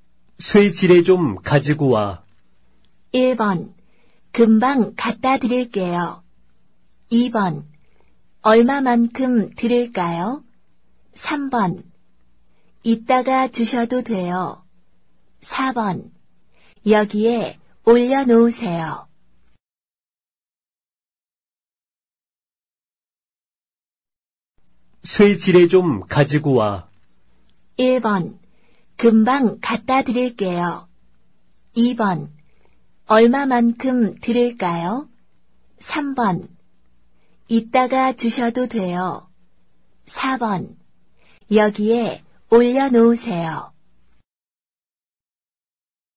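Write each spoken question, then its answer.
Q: 쇠지레 좀 가지고 와.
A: 1: 금방 갖다 드릴게요.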